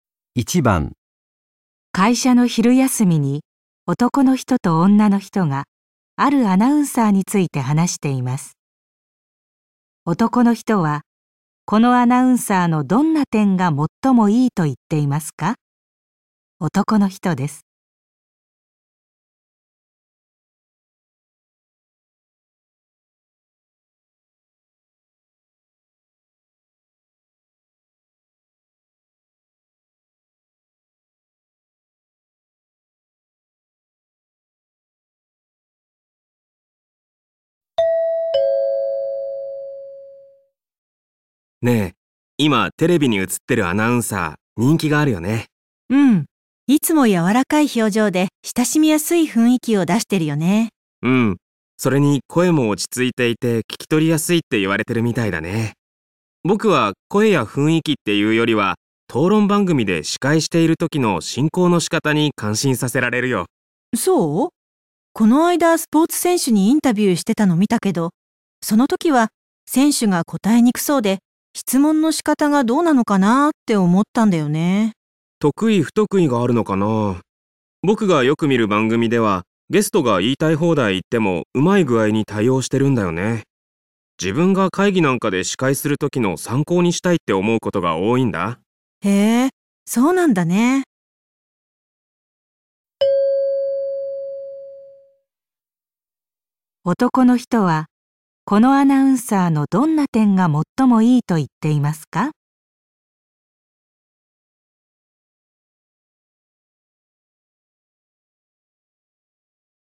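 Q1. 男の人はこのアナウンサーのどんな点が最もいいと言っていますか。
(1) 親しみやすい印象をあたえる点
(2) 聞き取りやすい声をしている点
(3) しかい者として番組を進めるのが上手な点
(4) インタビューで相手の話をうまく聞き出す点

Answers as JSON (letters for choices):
{"1": "3"}

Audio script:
男:ねえ、今テレビに映ってるアナウンサー、人気があるよね。
女:うん、いつも柔らかい表情で親しみやすい雰囲気を出してるよね。
男:うん、それに、声も落ち着いていて、聞き取りやすいって言われてるみたいだね。僕は声や雰囲気って言うよりは討論番組で司会している時の進行の仕方に感心させられるよ。
女:そう。この間スポーツ選手にインタビューしてたのを見たけど、その時は選手が答えにくそうで、質問の仕方がどうなのかなぁって思ったんだよね。
男:得意不得意があるのかなぁ。僕がよく見る番組ではゲストが言いたい放題言っても、うまい具合に対応してるんだよね。自分が会議なんかで司会するときの参考にしたいと思うことが多いんだ。
女:へえ、そうなんだね。

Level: N2 第3回】聴解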